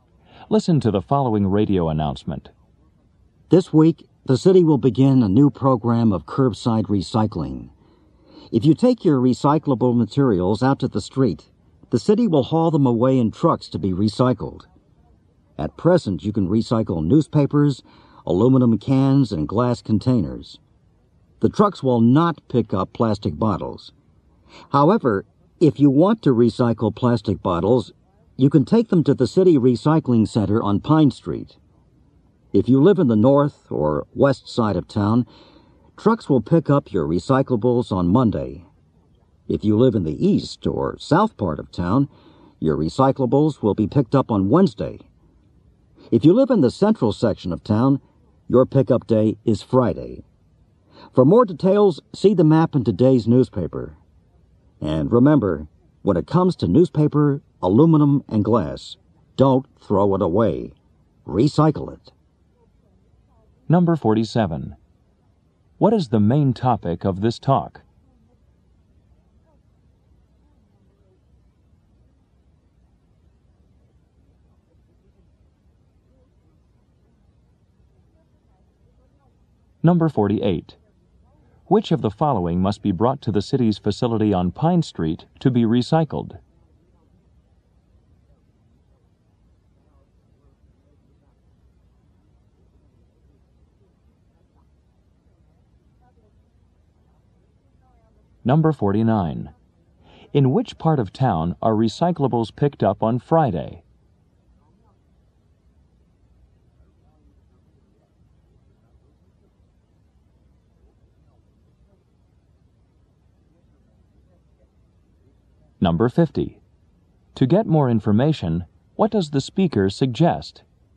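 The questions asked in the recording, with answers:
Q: What is the main topic of this talk?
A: The city's new curbside recycling program

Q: Which of the following must be brought to the city's facility on Pine Street to be recycled?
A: Plastic bottles

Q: In which part of town are recyclables picked up on Friday?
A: The central section

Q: To get more information, what does the speaker suggest?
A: Looking at the map in today's newspaper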